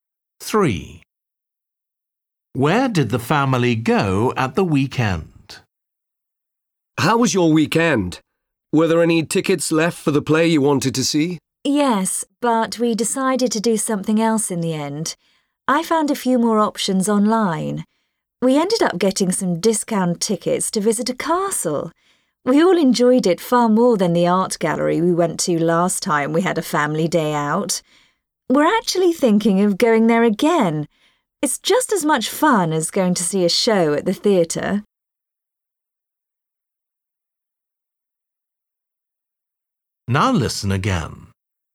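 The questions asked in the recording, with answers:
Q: Where did the family go at the weekend?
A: a castle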